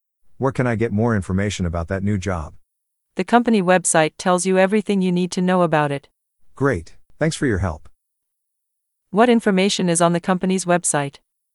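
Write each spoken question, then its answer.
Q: What information is on the company's website?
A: Information about the new job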